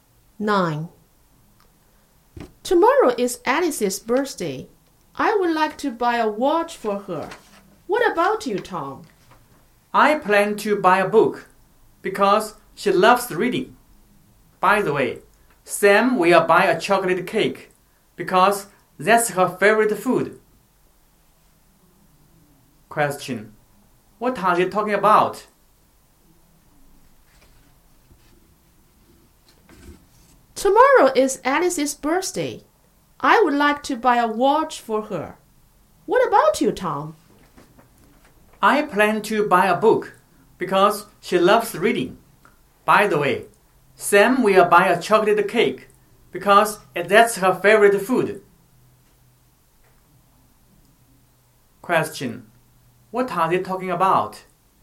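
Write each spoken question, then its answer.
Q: What are they talking about?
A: Birthday presents for Alice.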